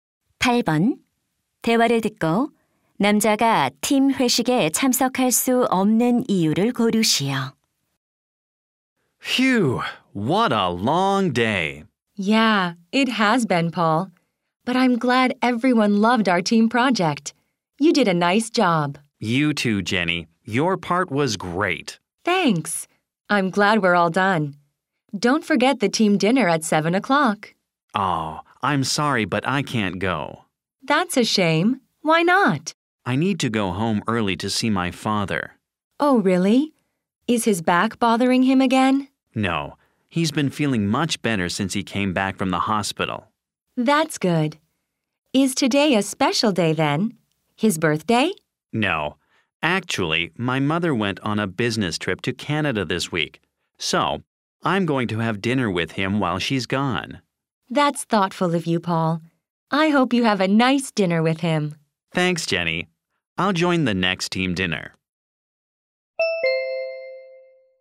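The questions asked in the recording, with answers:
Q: 대화를 듣고 남자가 팀 회식에 참석할 수 없는 이유를 고르시오.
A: 아버지와 저녁을 먹어야 해서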